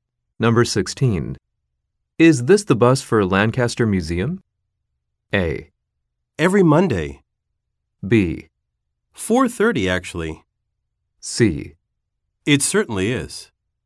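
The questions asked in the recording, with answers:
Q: Is this the bus for Lancaster Museum?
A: C: It certainly is.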